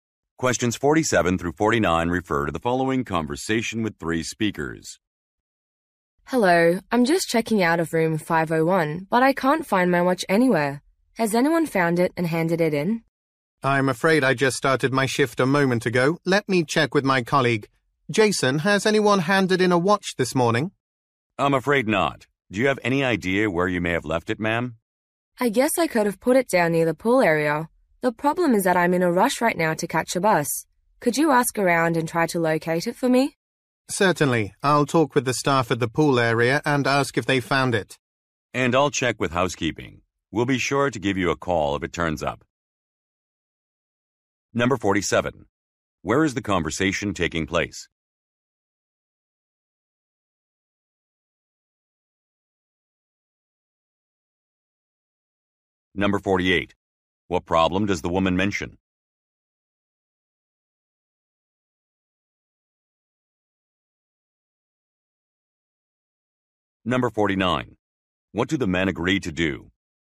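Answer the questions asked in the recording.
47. At a hotel
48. She lost her watch
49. Look for the watch and call her if it's found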